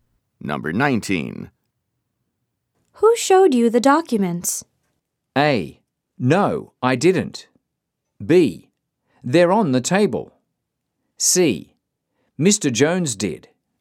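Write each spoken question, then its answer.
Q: Who showed you the documents?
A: C: Mr. Jones did.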